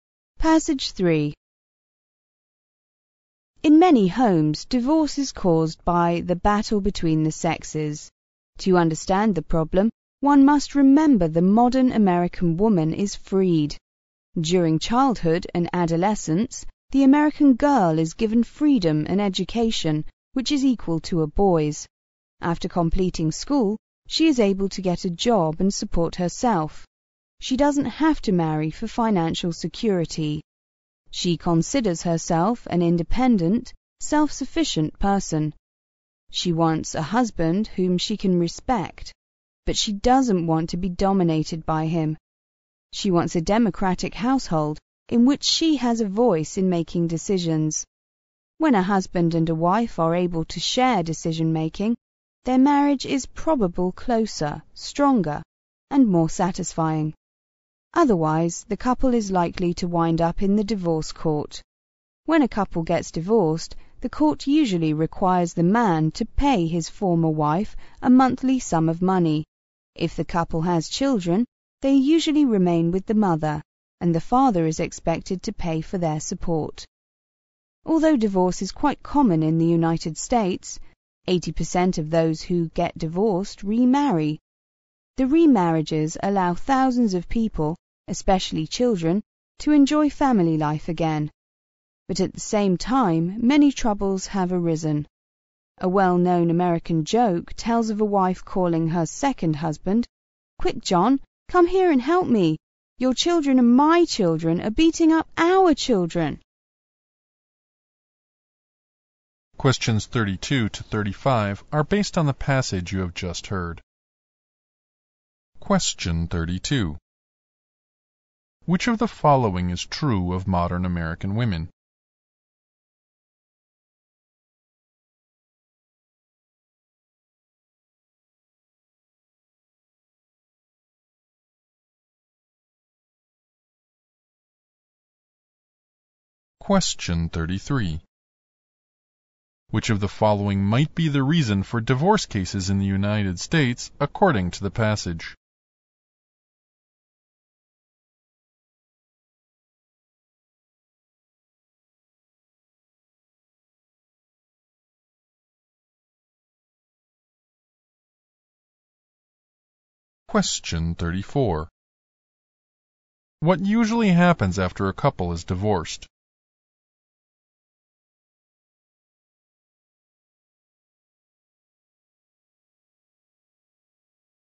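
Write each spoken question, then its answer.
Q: What usually happens after a couple is divorced?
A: The man pays his former wife a monthly sum; children stay with the mother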